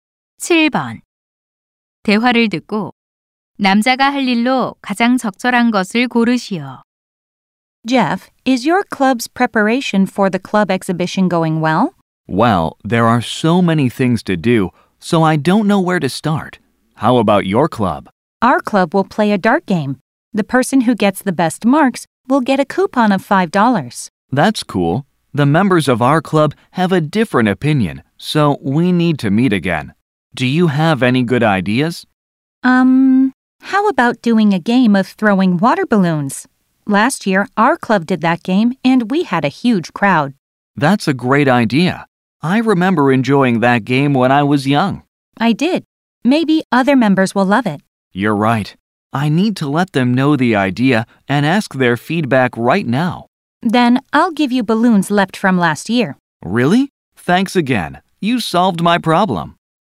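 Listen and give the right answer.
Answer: 동아리 회원들에게 아이디어를 알리고 의견 묻기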